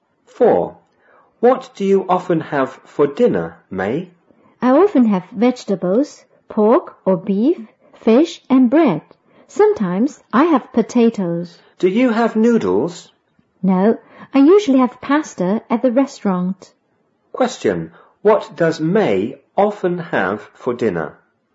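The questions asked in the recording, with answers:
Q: Question, what does May often have for dinner?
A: Vegetables, pork or beef, fish and bread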